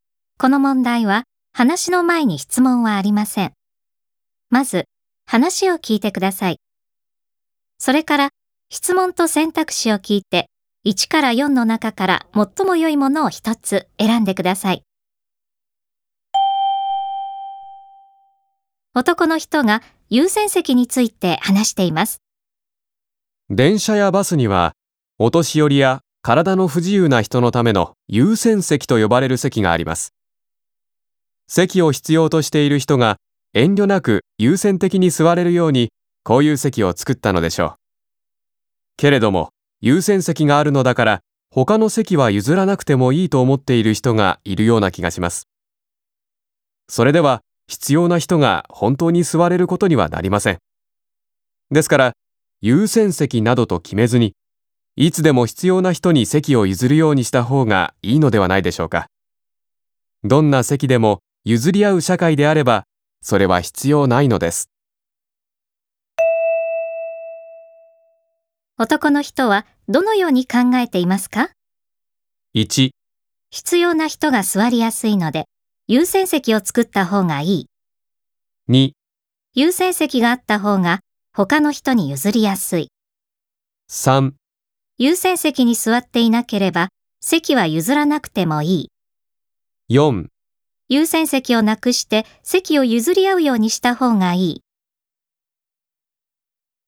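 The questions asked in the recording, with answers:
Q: 男の人はどのように考えていますか?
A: 4: 優先席をなくして席を譲り合うようにした方がいい。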